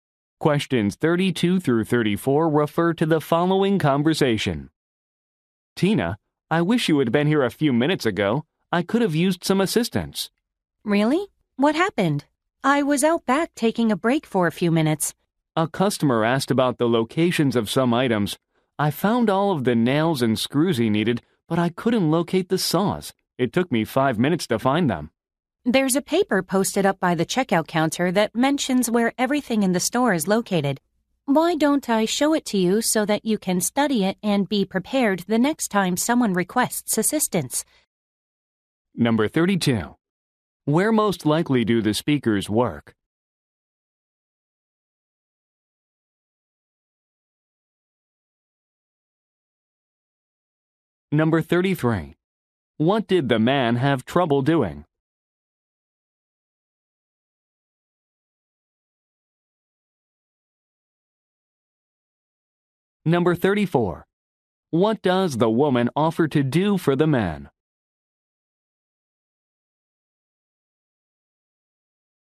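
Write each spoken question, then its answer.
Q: Where most likely do the speakers work?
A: At a hardware store

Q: What did the man have trouble doing?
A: Finding the saws for a customer

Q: What does the woman offer to do for the man?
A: Show him a paper listing where items are located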